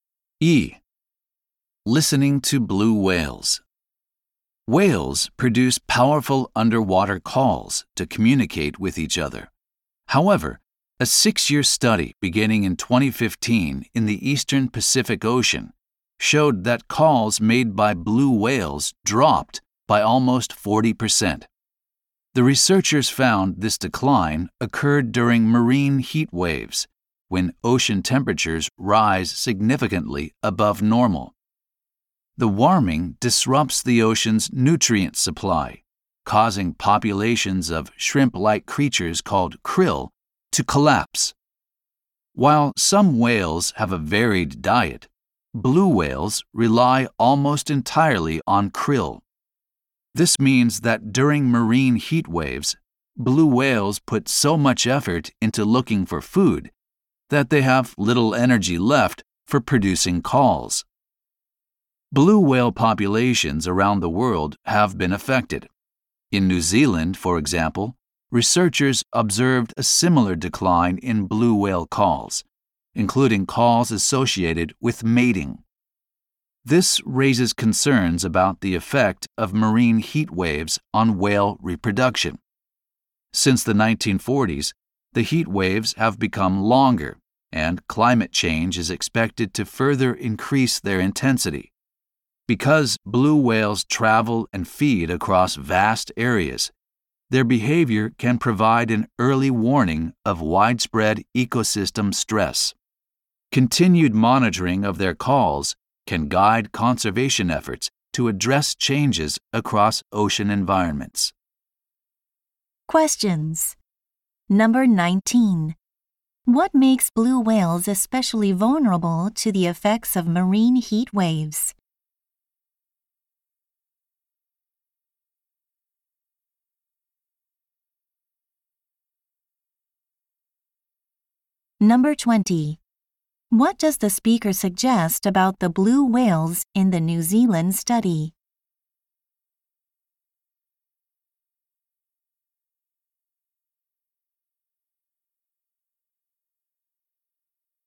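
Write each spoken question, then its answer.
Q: What makes blue whales especially vulnerable to the effects of marine heat waves?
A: They rely almost entirely on krill

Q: What does the speaker suggest about the blue whales in the New Zealand study?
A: Their reproduction may be affected by fewer mating calls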